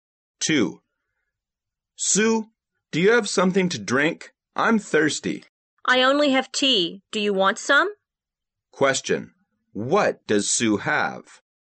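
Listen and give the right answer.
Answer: Tea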